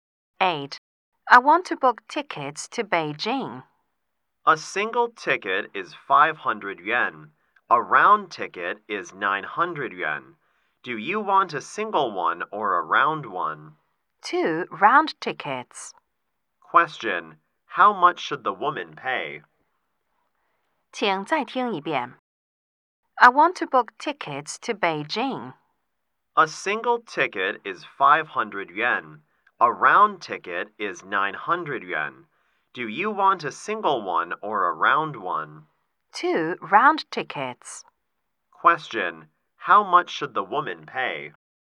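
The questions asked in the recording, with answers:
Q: How much should the woman pay?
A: 1800 yen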